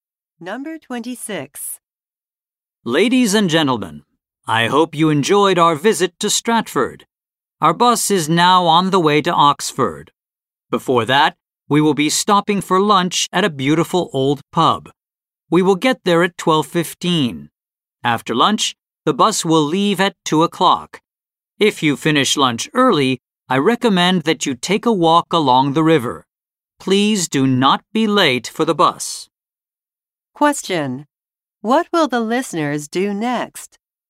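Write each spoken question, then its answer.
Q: What will the listeners do next?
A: Stop for lunch at an old pub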